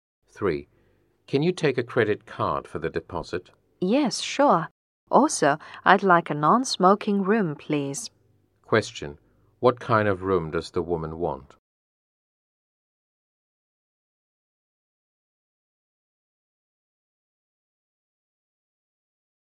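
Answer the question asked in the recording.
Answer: A non-smoking room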